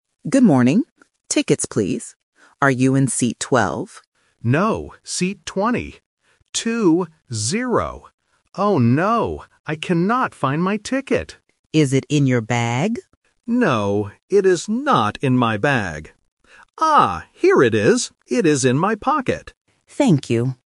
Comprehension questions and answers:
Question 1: What is the passenger looking for?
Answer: A ticket

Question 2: What is the passenger's seat number?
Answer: 20

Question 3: Where is the ticket?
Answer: In the pocket

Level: A1